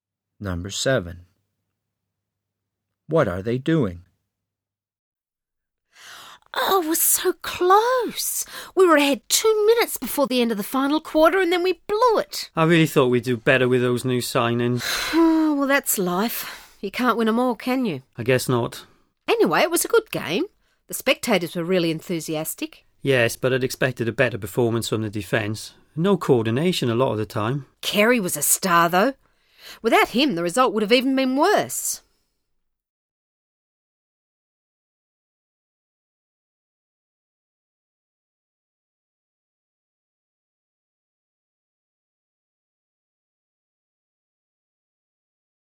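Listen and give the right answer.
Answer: Discussing a game their team lost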